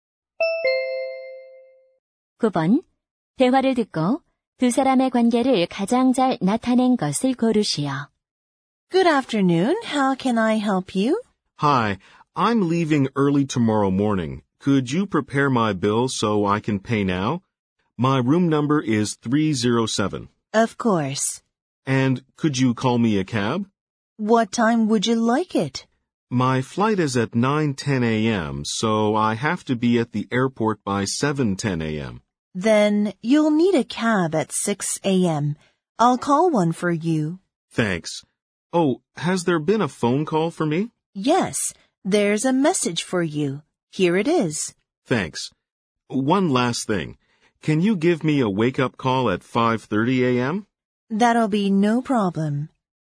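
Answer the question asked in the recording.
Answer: 호텔 직원과 투숙객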